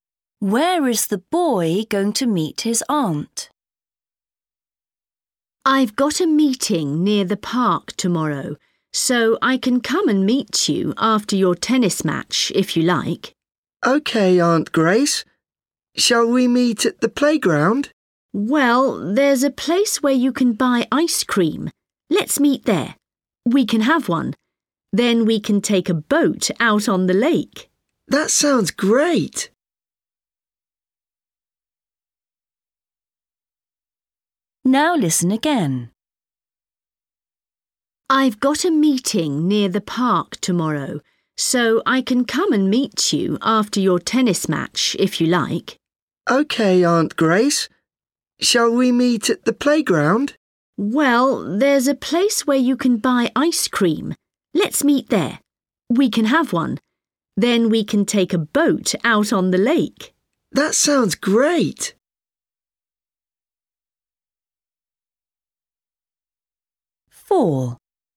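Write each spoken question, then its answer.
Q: Where is the boy going to meet his aunt?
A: At the ice cream place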